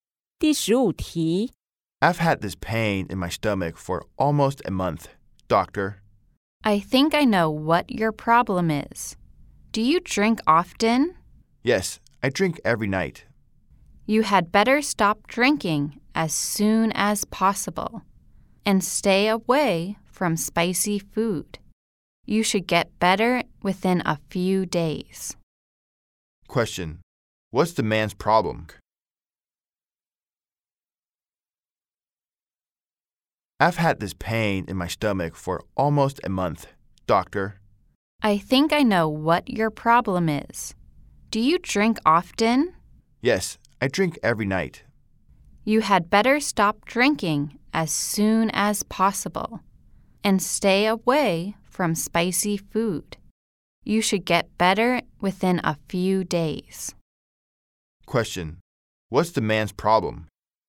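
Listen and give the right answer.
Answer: He has stomach pain from drinking every night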